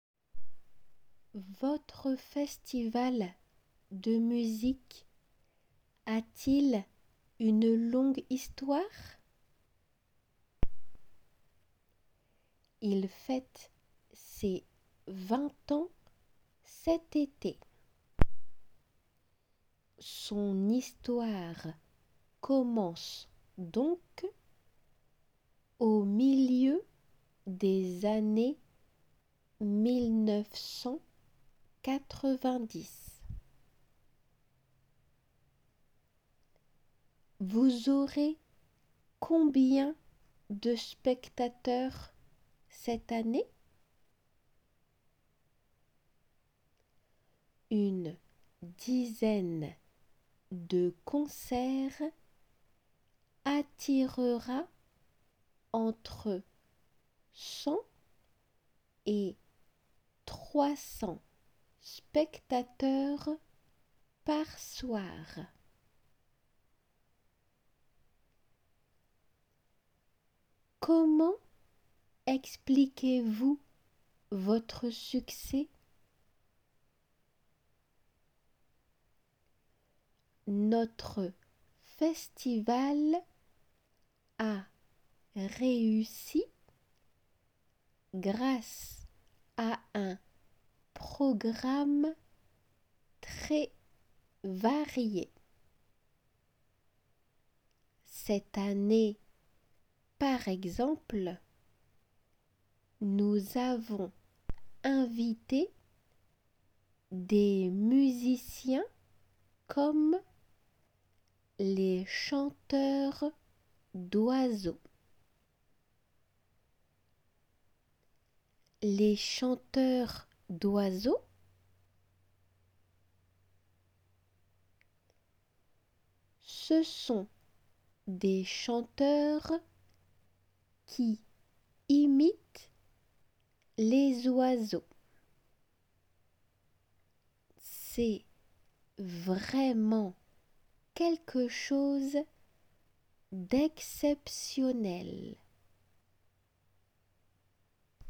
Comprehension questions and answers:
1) Oui, son histoire commence au ( ) des années ( ).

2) Une ( ) de concerts ( ) entre 100 et 300 spectateurs par soir.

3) Selon elle, le festival a réussi grâce à un ( ) très ( ).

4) Ce sont des chanteurs qui ( ) les oiseaux.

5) Elle pense que c'est vraiment quelque chose d( ).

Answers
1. milieu 1990
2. dizaine attirera
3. programme varié
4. imitent
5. exceptionnel